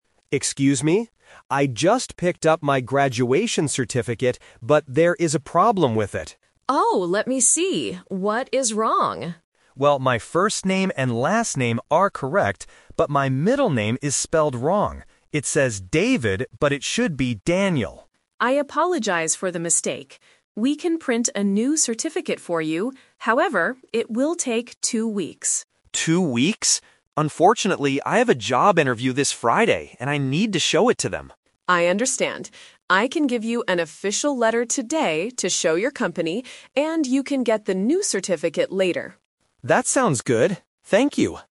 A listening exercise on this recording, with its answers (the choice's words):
Listen to a student talking to a university staff member. Circle the correct answer (A, B, or C) for each question.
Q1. What is wrong with the student's certificate?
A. His first name is wrong.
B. His middle name is misspelled.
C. His last name is missing.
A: His middle name is misspelled.

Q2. When is the student's job interview?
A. Today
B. On Friday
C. In two weeks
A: On Friday

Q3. What will the staff member give the student today?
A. A new certificate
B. A job application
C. An official letter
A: An official letter

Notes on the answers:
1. The student says his first name and last name are correct (Option A and C are traps), but his middle name is spelled wrong.
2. The student says, "I have a job interview this Friday." Option A (today) is when he gets the letter. Option C (two weeks) is how long it takes to print a new certificate.
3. The staff member says it takes two weeks to print a new certificate (Option A is a trap). Because he needs something for his interview, she will give him "an official letter today". Option B is not mentioned.

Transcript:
Student: Excuse me. I just picked up my graduation certificate, but there is a problem with it.
Staff: Oh, let me see. What is wrong?
Student: Well, my first name and last name are correct, but my middle name is spelled wrong. It says "David", but it should be "Daniel".
Staff: I apologize for the mistake. We can print a new certificate for you. However, it will take two weeks.
Unfortunately, I have a job interview this Friday and I need to show it to them.
Staff: I understand. I can give you an official letter today to show your company, and you can get the new certificate later.